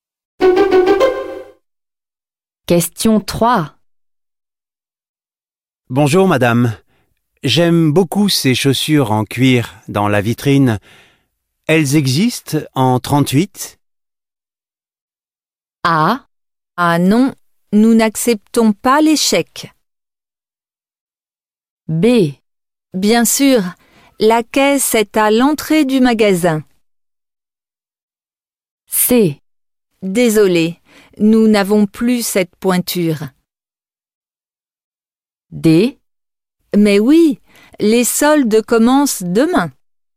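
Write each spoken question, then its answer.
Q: Bonjour, madame. J'aime beaucoup ces chaussures en cuir dans la vitrine. Elles existent en 38?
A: C: Désolé, nous n'avons plus cette pointure.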